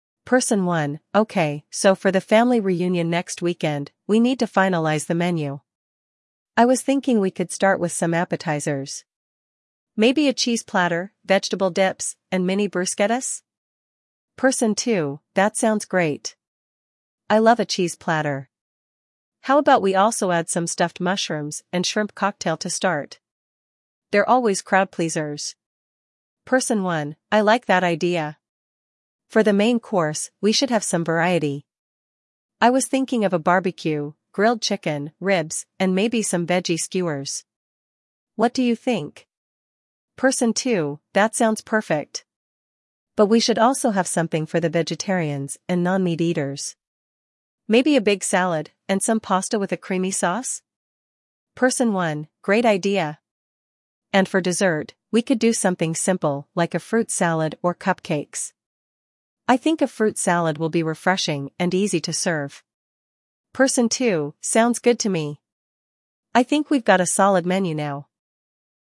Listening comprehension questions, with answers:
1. What type of appetizers do the speakers consider for the family reunion?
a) Soup and sandwiches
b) Cheese platter, vegetable dips, and mini bruschettas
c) Fruit salad and cupcakes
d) Chips and salsa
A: b) Cheese platter, vegetable dips, and mini bruschettas

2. What additional appetizers does Person 2 suggest?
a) Fruit salad and cheese platter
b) Stuffed mushrooms and shrimp cocktail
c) Pizza and garlic bread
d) Bruschettas and chips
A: b) Stuffed mushrooms and shrimp cocktail

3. What is Person 1's suggestion for the main course?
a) Fried rice and soup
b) Grilled chicken, ribs, and veggie skewers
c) Salad and pasta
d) Sandwiches and fruit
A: b) Grilled chicken, ribs, and veggie skewers

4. What does Person 2 suggest for the vegetarians?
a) Grilled chicken and salad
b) A big salad and pasta with creamy sauce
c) Fruit salad and cupcakes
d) Vegetable skewers and breadsticks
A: b) A big salad and pasta with creamy sauce

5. What dessert options are mentioned for the reunion?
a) Cake and ice cream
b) Fruit salad and cupcakes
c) Brownies and cookies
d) Pies and cookies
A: b) Fruit salad and cupcakes

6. What does Person 1 think about the menu after discussing it?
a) They think it needs more variety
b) They think it's a great menu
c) They want to add more appetizers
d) They are unsure about the dessert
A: b) They think it's a great menu

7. What type of food is mentioned for the main course?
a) Grilled meat and salads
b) Barbecue with grilled chicken, ribs, and veggie skewers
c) Pasta and vegetables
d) Sandwiches and chips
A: b) Barbecue with grilled chicken, ribs, and veggie skewers

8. What is the final dessert choice agreed upon?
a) Fruit salad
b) Cake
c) Cupcakes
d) Ice cream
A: a) Fruit salad

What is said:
Person 1: "Okay, so for the family reunion next weekend, we need to finalize the menu. I was thinking we could start with some appetizers. Maybe a cheese platter, vegetable dips, and mini bruschettas?"
Person 2: "That sounds great. I love a cheese platter. How about we also add some stuffed mushrooms and shrimp cocktail to start? They're always crowd-pleasers."
Person 1: "I like that idea! For the main course, we should have some variety. I was thinking of a barbecue—grilled chicken, ribs, and maybe some veggie skewers. What do you think?"
Person 2: "That sounds perfect! But we should also have something for the vegetarians and non-meat eaters. Maybe a big salad, and some pasta with a creamy sauce?"
Person 1: "Great idea! And for dessert, we could do something simple like a fruit salad or cupcakes. I think a fruit salad will be refreshing and easy to serve."
Person 2: "Sounds good to me! I think we've got a solid menu now."

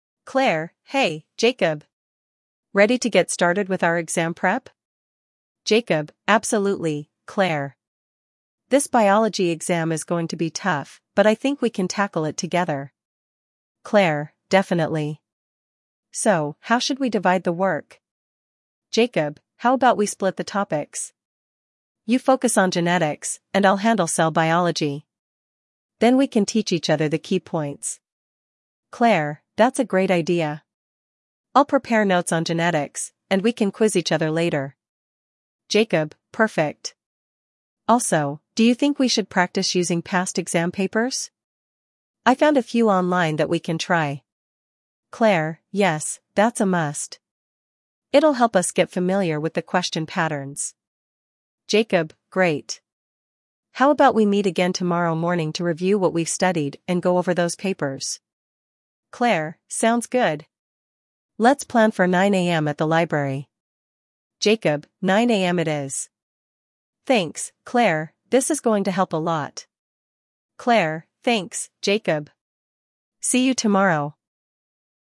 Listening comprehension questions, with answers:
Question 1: What subject are Claire and Jacob studying for?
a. History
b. Biology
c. Mathematics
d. Physics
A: b. Biology

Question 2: What study method do they decide to use?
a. Taking practice quizzes together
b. Dividing topics and teaching each other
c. Watching online tutorials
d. Reading textbooks independently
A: b. Dividing topics and teaching each other

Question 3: Which topic does Claire agree to focus on?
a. Cell biology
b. Genetics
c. Ecosystems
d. Human anatomy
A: b. Genetics

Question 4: What resource do they plan to use for additional practice?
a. Flashcards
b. Past exam papers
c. Lecture notes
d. A study app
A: b. Past exam papers

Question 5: When do they plan to meet next for their study session?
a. Tomorrow morning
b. This evening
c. Over the weekend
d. Next Monday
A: a. Tomorrow morning

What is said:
Claire: Hey, Jacob! Ready to get started with our exam prep?
Jacob: Absolutely, Claire. This biology exam is going to be tough, but I think we can tackle it together.
Claire: Definitely. So, how should we divide the work?
Jacob: How about we split the topics? You focus on genetics, and I'll handle cell biology. Then we can teach each other the key points.
Claire: That's a great idea. I'll prepare notes on genetics, and we can quiz each other later.
Jacob: Perfect. Also, do you think we should practice using past exam papers? I found a few online that we can try.
Claire: Yes, that's a must. It'll help us get familiar with the question patterns.
Jacob: Great. How about we meet again tomorrow morning to review what we've studied and go over those papers?
Claire: Sounds good! Let's plan for 9 AM at the library.
Jacob: 9 AM it is. Thanks, Claire—this is going to help a lot.
Claire: Thanks, Jacob. See you tomorrow!

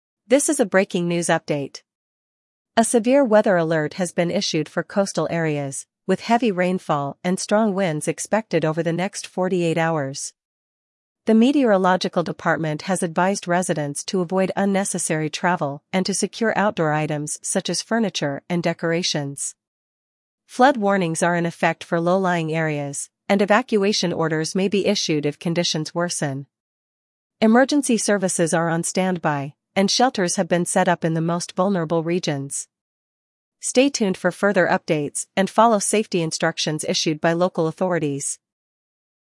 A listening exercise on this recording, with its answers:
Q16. What type of weather is expected in the coastal areas?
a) Snow and freezing rain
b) Heavy rainfall and strong winds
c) Mild temperatures and light showers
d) Clear skies and sunny weather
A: b) Heavy rainfall and strong winds

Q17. What advice has been given to residents?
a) Continue outdoor activities as usual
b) Avoid unnecessary travel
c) Move to higher ground immediately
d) Purchase emergency supplies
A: b) Avoid unnecessary travel

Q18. What has been set up for vulnerable regions?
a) First aid stations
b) Temporary shelters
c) Food distribution centers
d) Water supply points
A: b) Temporary shelters

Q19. Who is on standby during the weather alert?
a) Local schools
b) Emergency services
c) Volunteer groups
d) Public transportation services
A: b) Emergency services

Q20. How long is the severe weather expected to last?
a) 24 hours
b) 48 hours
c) 72 hours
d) A week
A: b) 48 hours

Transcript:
This is a breaking news update. A severe weather alert has been issued for coastal areas, with heavy rainfall and strong winds expected over the next 48 hours. The meteorological department has advised residents to avoid unnecessary travel and to secure outdoor items such as furniture and decorations.
Flood warnings are in effect for low-lying areas, and evacuation orders may be issued if conditions worsen. Emergency services are on standby, and shelters have been set up in the most vulnerable regions. Stay tuned for further updates and follow safety instructions issued by local authorities.

